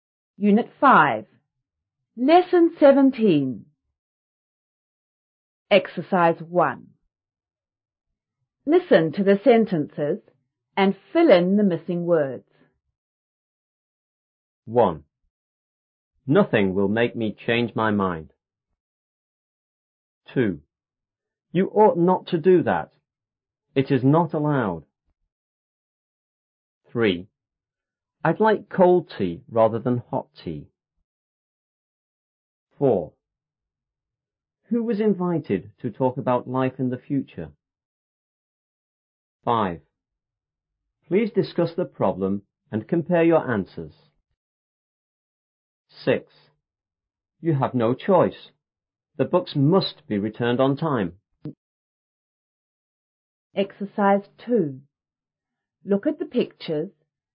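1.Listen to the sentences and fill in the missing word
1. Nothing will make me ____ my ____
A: change; mind

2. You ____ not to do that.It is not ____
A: ought; allowed

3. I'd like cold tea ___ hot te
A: rather than

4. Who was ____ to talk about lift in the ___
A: invited; future

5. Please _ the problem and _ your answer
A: discuss; compare

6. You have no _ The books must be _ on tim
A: choice; returned

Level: 初中英语广州版5B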